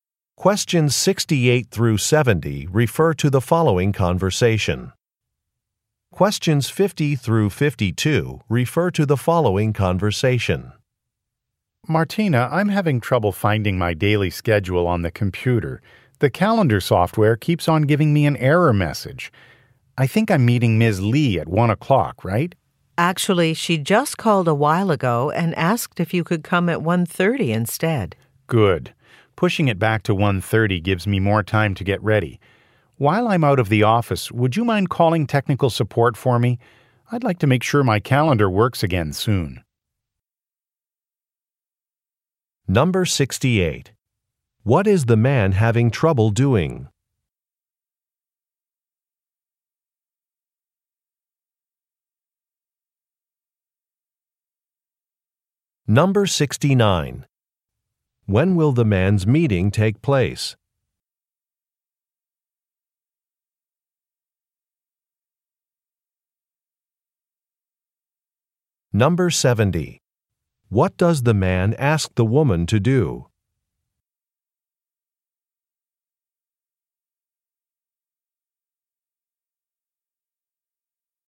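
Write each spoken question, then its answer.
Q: What is the man having trouble doing?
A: Finding his schedule on the computer

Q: When will the man's meeting take place?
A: At 1:30

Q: What does the man ask the woman to do?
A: Call technical support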